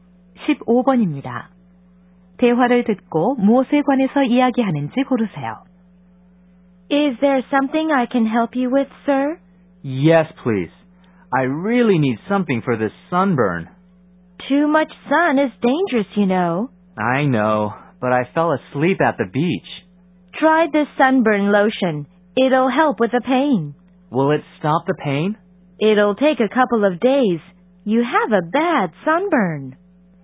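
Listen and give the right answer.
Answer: 햇볕 화상(선번) 치료용 로션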